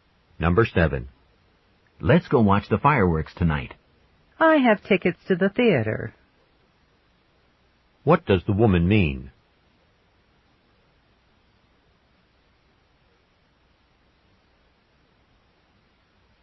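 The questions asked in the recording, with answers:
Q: What does the woman mean?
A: She can't go to the fireworks because she is going to the theater.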